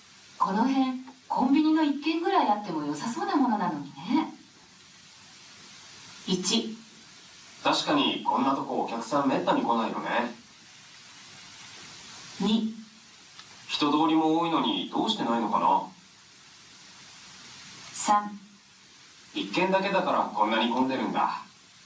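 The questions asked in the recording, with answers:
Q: この辺コンビニの1軒ぐらいあっても良さそうなものなのにね。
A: 2: 人通りも多いのにどうしてないのかな。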